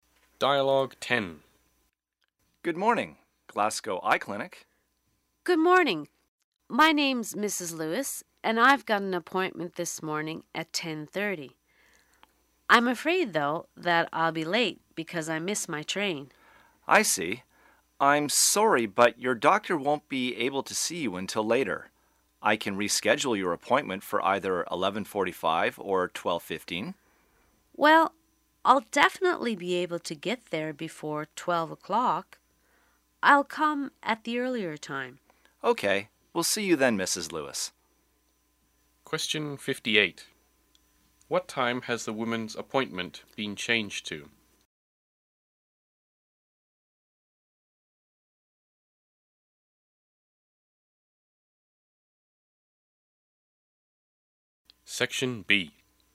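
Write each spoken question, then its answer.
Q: What time has the woman's appointment been changed to?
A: 11:45.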